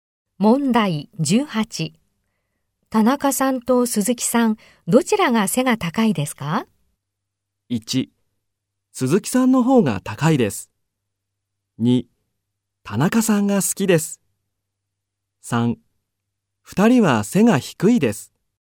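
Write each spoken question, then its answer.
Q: 田中さんと鈴木さん、どちらが背が高いですか?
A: 1: 鈴木さんの方が高いです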